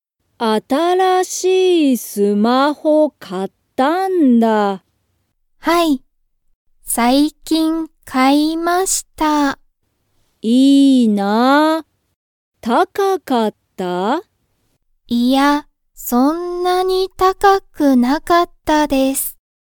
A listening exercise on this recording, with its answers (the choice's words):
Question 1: 水野(みずの)さんの新(あたら)しいスマホは、高(たか)かったですか?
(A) はい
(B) いいえ)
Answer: いいえ)

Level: Level 1